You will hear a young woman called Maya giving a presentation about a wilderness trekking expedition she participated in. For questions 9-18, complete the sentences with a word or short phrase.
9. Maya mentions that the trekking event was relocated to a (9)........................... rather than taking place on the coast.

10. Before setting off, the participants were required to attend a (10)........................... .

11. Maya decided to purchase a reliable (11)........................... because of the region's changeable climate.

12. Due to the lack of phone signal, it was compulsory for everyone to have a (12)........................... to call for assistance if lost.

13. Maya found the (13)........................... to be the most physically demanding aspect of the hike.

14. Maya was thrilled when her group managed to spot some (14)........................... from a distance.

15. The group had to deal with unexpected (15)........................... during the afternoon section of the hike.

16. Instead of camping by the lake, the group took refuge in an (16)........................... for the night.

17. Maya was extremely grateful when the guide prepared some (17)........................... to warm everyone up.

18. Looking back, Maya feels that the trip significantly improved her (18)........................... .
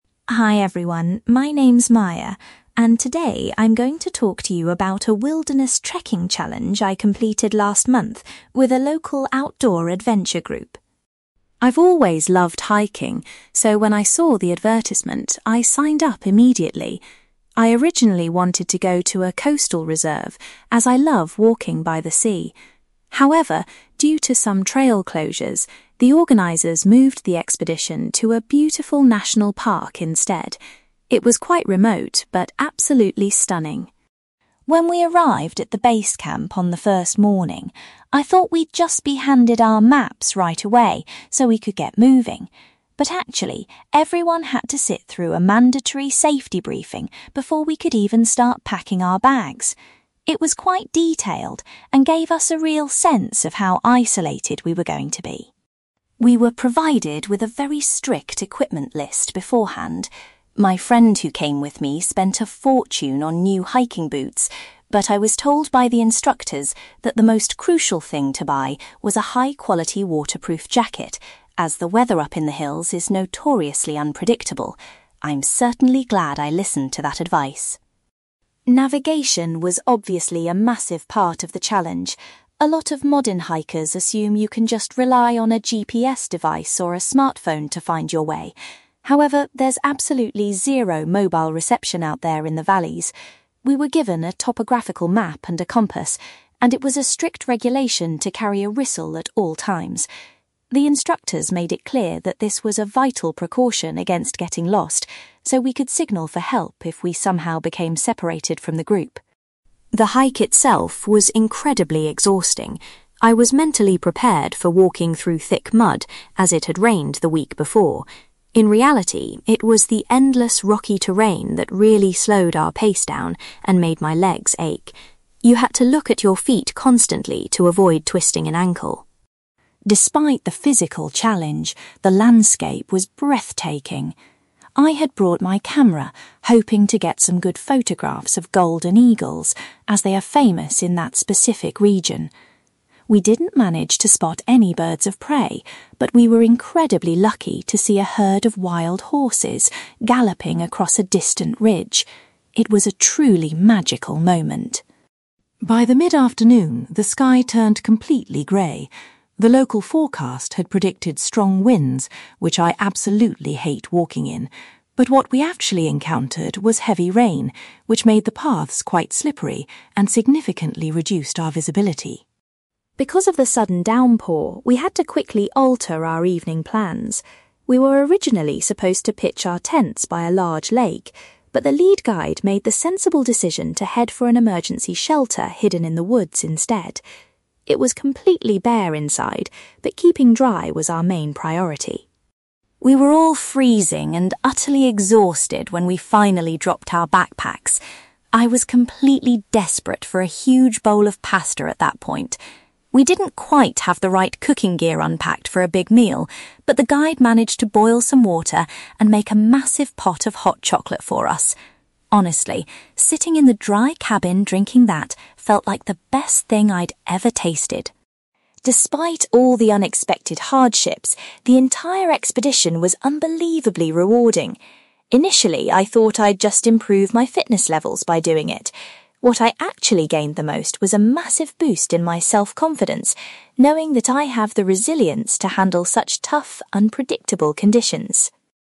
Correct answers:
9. national park
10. safety briefing
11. waterproof jacket
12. whistle
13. rocky terrain
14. wild horses
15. heavy rain
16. emergency shelter
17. hot chocolate
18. self-confidence

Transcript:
Maya: Hi everyone, my name is Maya, and today I'm going to talk to you about a wilderness trekking challenge I completed last month with a local outdoor adventure group.
I've always loved hiking, so when I saw the advertisement, I signed up immediately. I originally wanted to go to a coastal reserve, as I love walking by the sea. However, due to some trail closures, the organisers moved the expedition to a beautiful national park instead. It was quite remote, but absolutely stunning.
When we arrived at the base camp on the first morning, I thought we'd just be handed our maps right away so we could get moving. But actually, everyone had to sit through a mandatory safety briefing before we could even start packing our bags. It was quite detailed and gave us a real sense of how isolated we were going to be.
We were provided with a very strict equipment list beforehand. My friend who came with me spent a fortune on new hiking boots, but I was told by the instructors that the most crucial thing to buy was a high-quality waterproof jacket, as the weather up in the hills is notoriously unpredictable. I'm certainly glad I listened to that advice!
Navigation was obviously a massive part of the challenge. A lot of modern hikers assume you can just rely on a GPS device or a smartphone to find your way. However, there's absolutely zero mobile reception out there in the valleys. We were given a topographical map and a compass, and it was a strict regulation to carry a whistle at all times. The instructors made it clear that this was a vital precaution against getting lost, so we could signal for help if we somehow became separated from the group.
The hike itself was incredibly exhausting. I was mentally prepared for walking through thick mud, as it had rained the week before. In reality, it was the endless rocky terrain that really slowed our pace down and made my legs ache. You had to look at your feet constantly to avoid twisting an ankle.
Despite the physical challenge, the landscape was breathtaking. I had brought my camera, hoping to get some good photographs of golden eagles, as they are famous in that specific region. We didn't manage to spot any birds of prey, but we were incredibly lucky to see a herd of wild horses galloping across a distant ridge. It was a truly magical moment.
By the mid-afternoon, the sky turned completely grey. The local forecast had predicted strong winds, which I absolutely hate walking in. But what we actually encountered was heavy rain, which made the paths quite slippery and significantly reduced our visibility.
Because of the sudden downpour, we had to quickly alter our evening plans. We were originally supposed to pitch our tents by a large lake, but the lead guide made the sensible decision to head for an emergency shelter hidden in the woods instead. It was completely bare inside, but keeping dry was our main priority.
We were all freezing and utterly exhausted when we finally dropped our backpacks. I was completely desperate for a huge bowl of pasta at that point. We didn't quite have the right cooking gear unpacked for a big meal, but the guide managed to boil some water and make a massive pot of hot chocolate for us. Honestly, sitting in the dry cabin drinking that felt like the best thing I'd ever tasted.
Despite all the unexpected hardships, the entire expedition was unbelievably rewarding. Initially, I thought I'd just improve my fitness levels by doing it. What I actually gained the most was a massive boost in my self-confidence, knowing that I have the resilience to handle such tough, unpredictable conditions.

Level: B2 English Listening Exercise